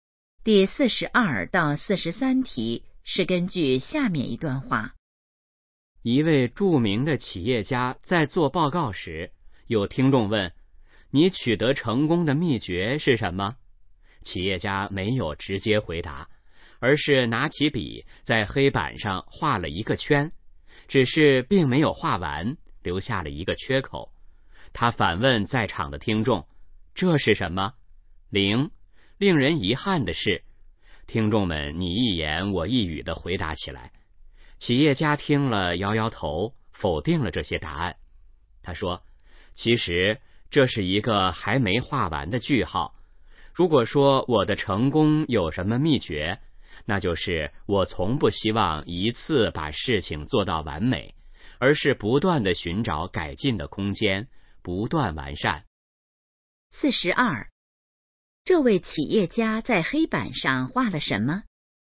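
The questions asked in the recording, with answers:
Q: 这位企业家在黑板上画了什么?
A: 一个没画完的句号

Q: 这位企业家认为成功的关键是什么?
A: 不断寻找改进的空间,不断完善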